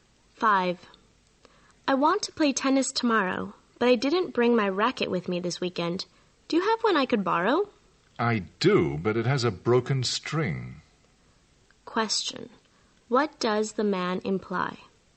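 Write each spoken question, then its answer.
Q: What does the man imply?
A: His racket can't be used because of a broken string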